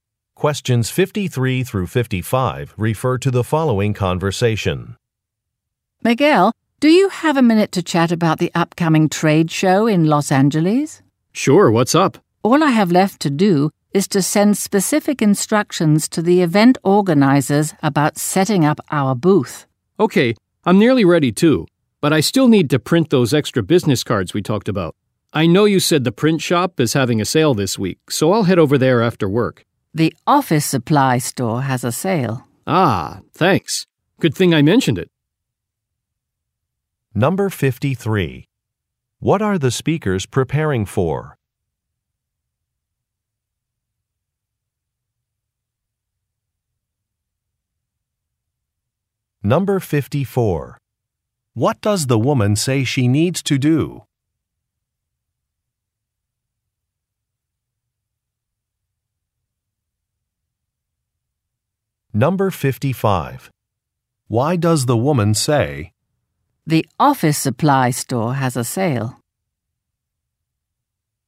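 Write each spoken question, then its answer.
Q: What are the speakers preparing for?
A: A trade show in Los Angeles

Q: What does the woman say she needs to do?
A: Send instructions to the event organizers about setting up the booth

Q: Why does the woman say, "The office supply store has a sale"?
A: To correct the man: the sale is at the office supply store, not the print shop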